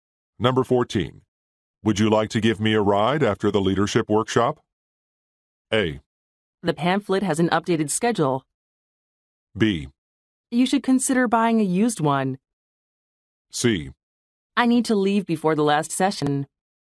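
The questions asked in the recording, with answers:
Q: Would you like to give me a ride after the leadership workshop?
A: C: I need to leave before the last session.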